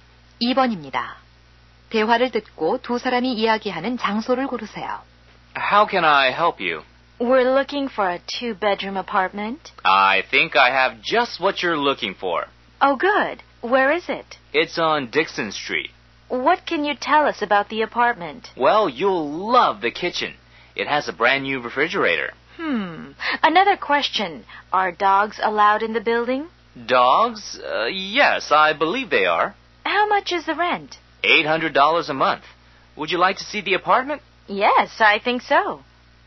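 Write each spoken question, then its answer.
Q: 대화를 듣고 두 사람이 이야기하는 장소를 고르세요.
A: 부동산 중개소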